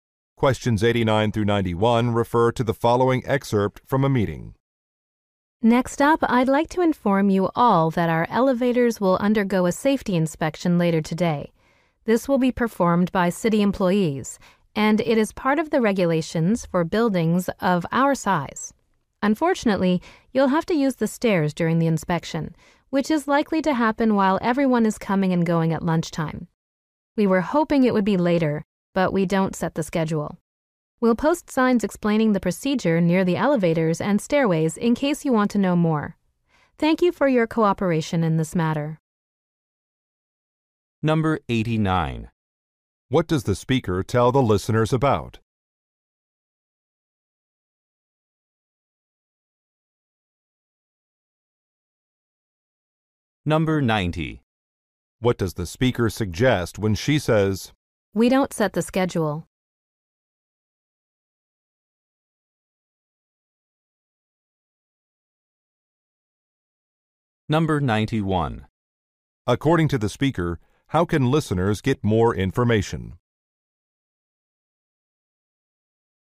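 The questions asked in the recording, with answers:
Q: What does the speaker tell the listeners about?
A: An elevator safety inspection

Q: According to the speaker, how can listeners get more information?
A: By reading signs near the elevators and stairways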